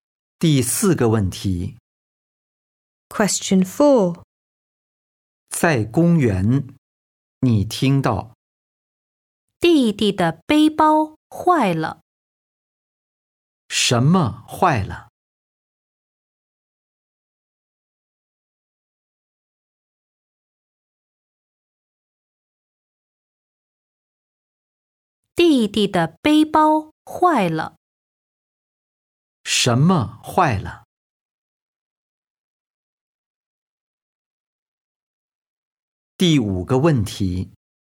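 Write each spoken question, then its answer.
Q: 什么坏了?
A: 弟弟的背包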